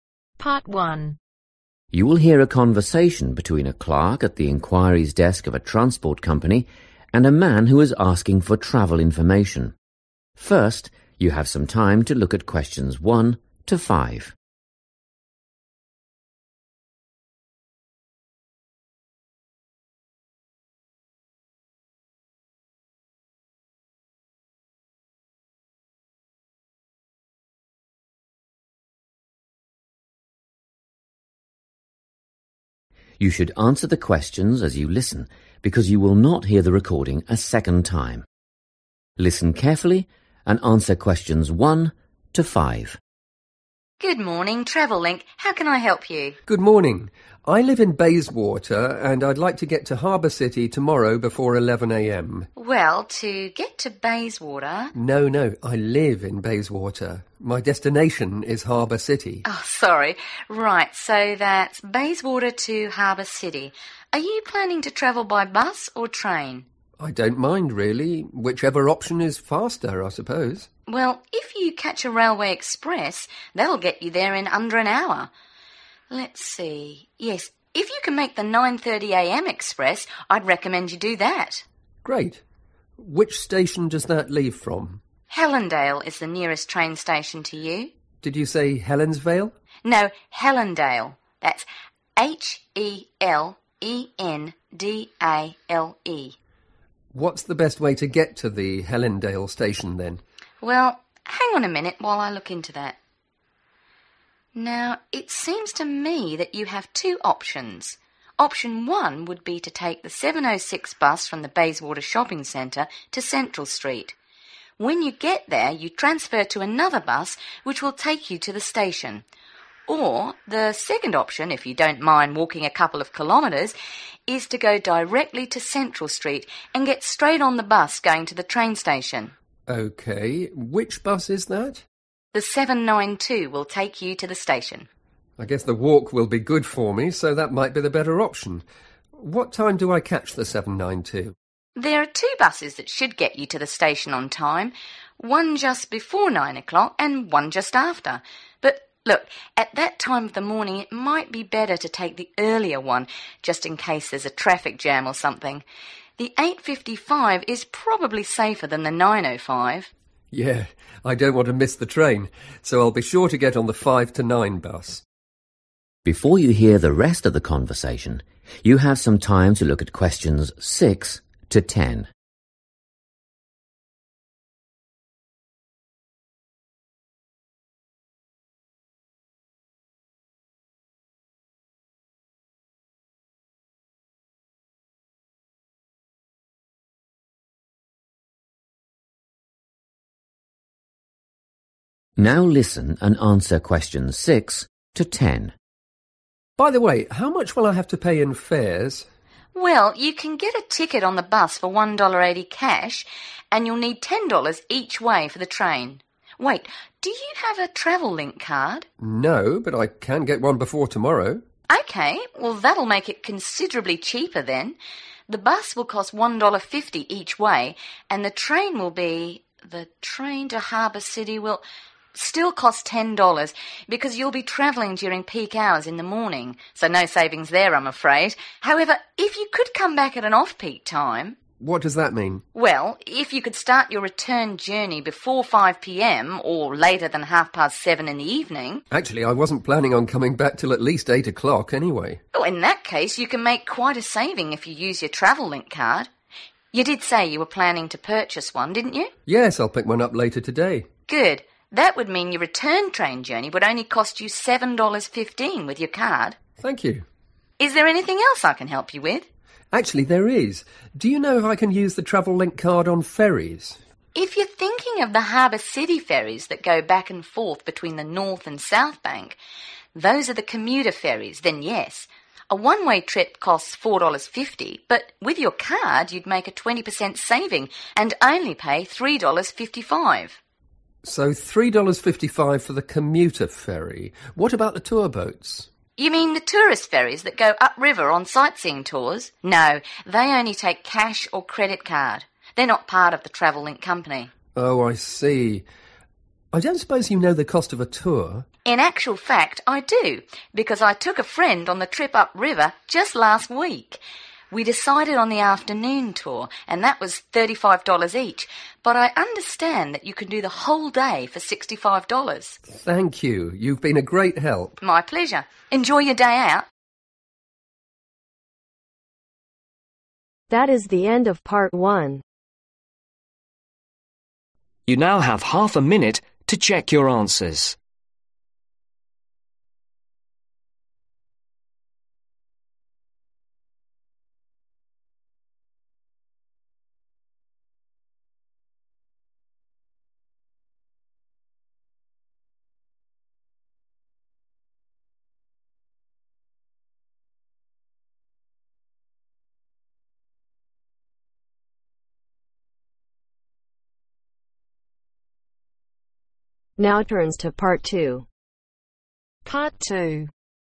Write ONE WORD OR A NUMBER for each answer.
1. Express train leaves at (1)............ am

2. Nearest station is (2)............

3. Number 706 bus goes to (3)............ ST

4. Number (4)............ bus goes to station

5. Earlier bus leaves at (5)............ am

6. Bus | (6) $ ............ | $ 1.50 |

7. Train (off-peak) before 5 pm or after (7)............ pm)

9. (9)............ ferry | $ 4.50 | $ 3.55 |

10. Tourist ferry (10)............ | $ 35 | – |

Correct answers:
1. 9.30
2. Helen dale
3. Central
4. 792
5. 8.55
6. 1.80
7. 7.30
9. Commuter
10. Afternoon